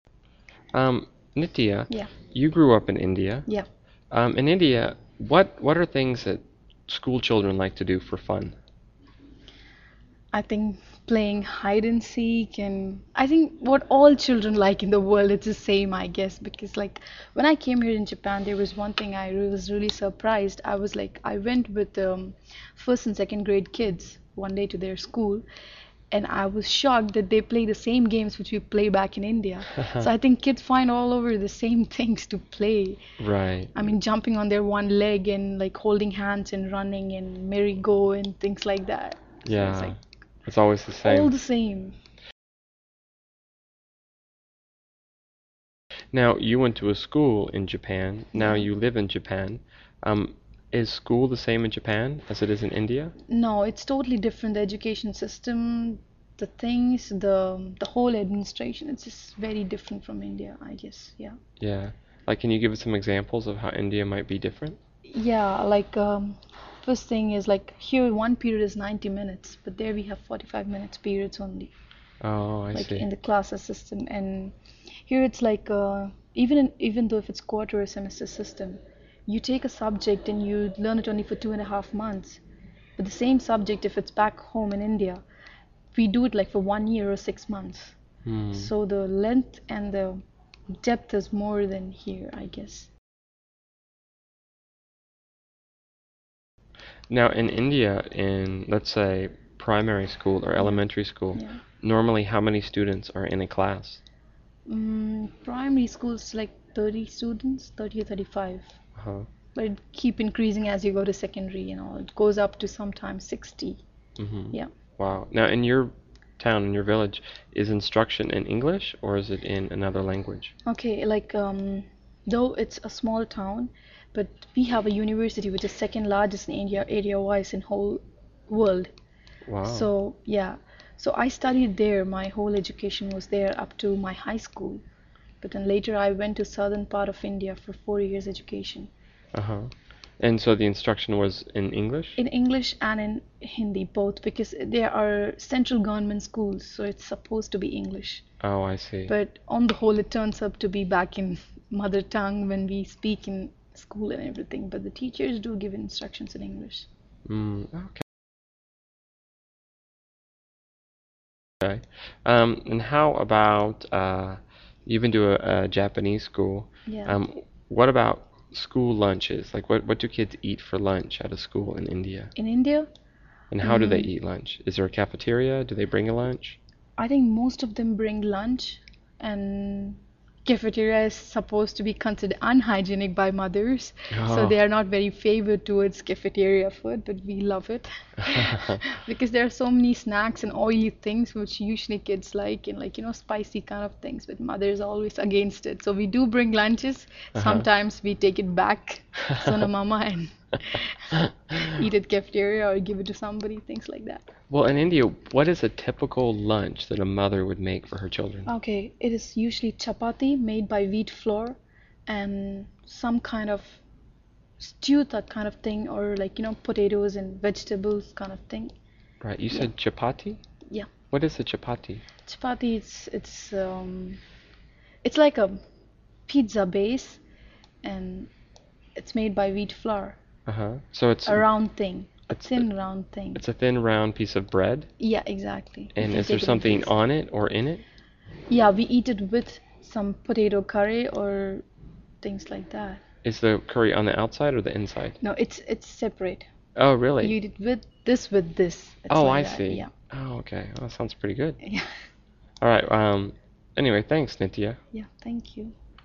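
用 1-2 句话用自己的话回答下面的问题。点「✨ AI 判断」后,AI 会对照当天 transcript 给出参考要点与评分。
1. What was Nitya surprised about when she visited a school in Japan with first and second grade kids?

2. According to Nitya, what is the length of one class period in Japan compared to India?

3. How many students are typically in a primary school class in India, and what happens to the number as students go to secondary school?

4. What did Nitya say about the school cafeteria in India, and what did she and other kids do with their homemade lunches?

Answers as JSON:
{"1": "That the kids played the same games they play back in India.", "2": "90 minutes in Japan, 45 minutes in India.", "3": "About 30 or 35; it keeps increasing, sometimes up to 60.", "4": "Mothers think it is unhygienic, but kids love its snacks; they sometimes took their lunches back home, ate at the cafeteria or gave them to somebody."}

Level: CEFRB1-B2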